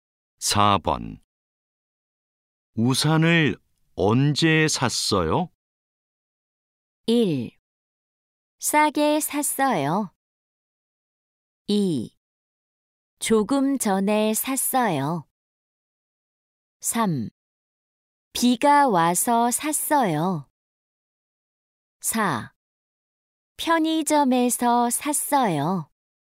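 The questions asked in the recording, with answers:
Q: 우산을 언제 샀어요?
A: 2: 조금 전에 샀어요.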